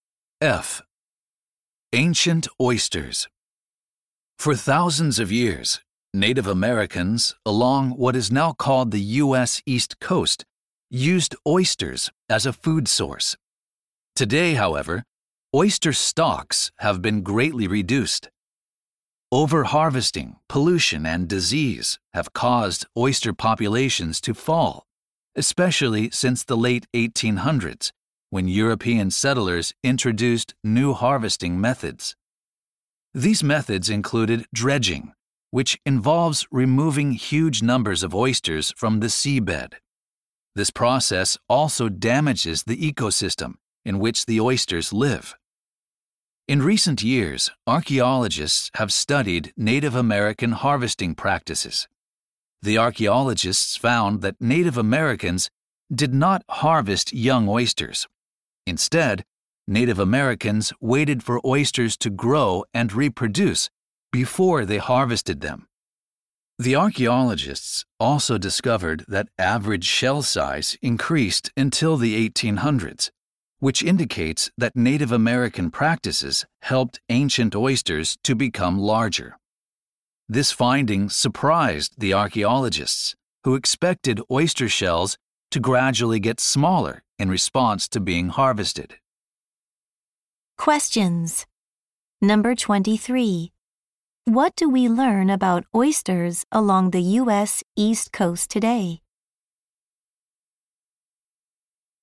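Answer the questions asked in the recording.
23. Their populations have been greatly reduced.
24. Native American practices helped oysters grow larger.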